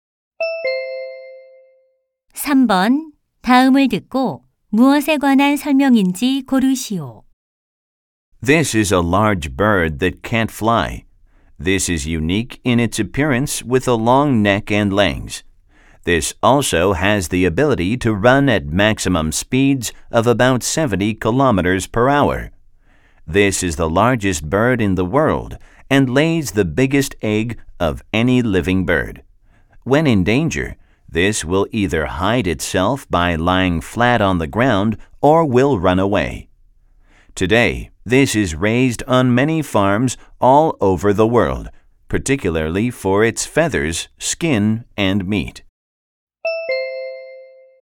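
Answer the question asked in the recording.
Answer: 타조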